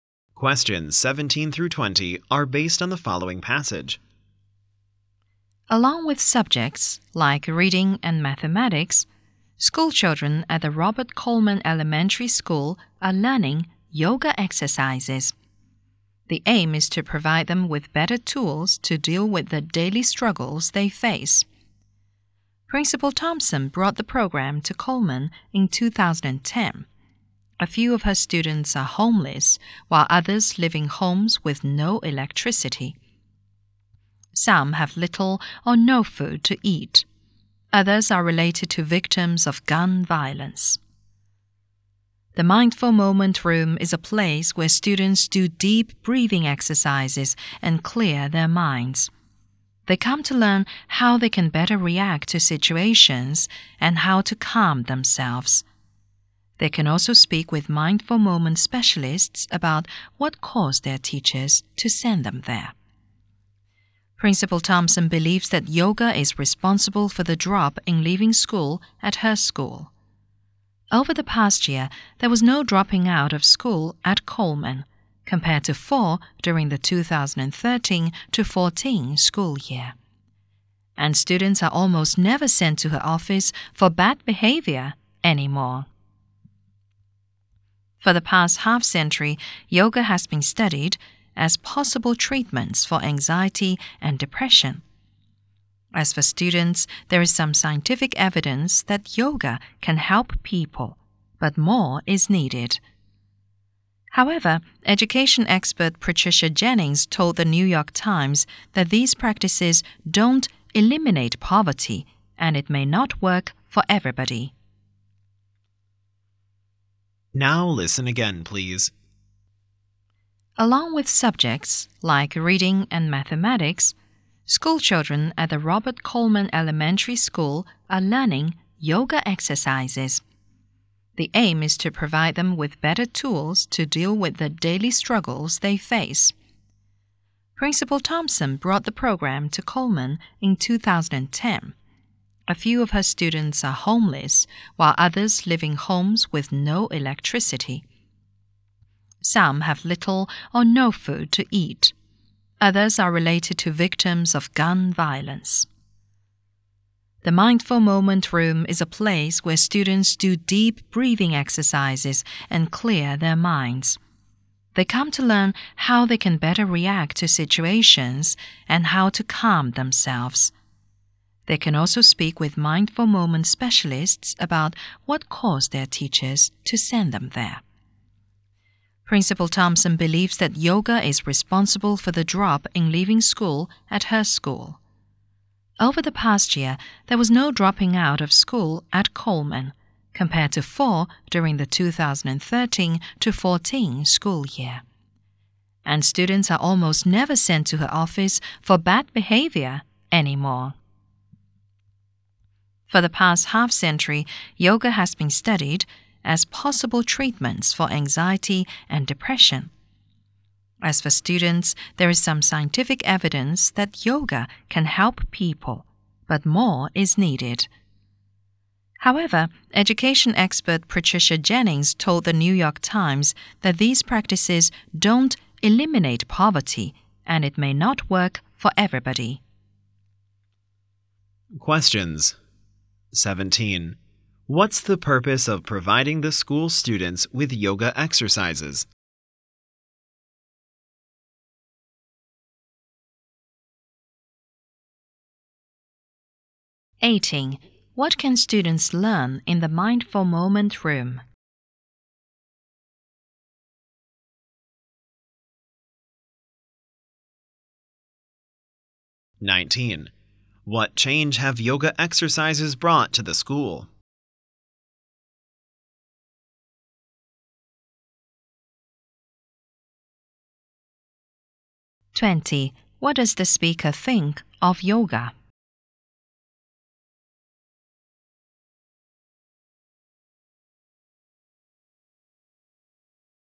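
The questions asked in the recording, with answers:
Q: What's the purpose of providing the school students with yoga exercises?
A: To give them better tools to deal with their daily struggles

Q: What can students learn in the Mindful Moment Room?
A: How to react better to situations and calm themselves

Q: What change have yoga exercises brought to the school?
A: No dropouts and less bad behavior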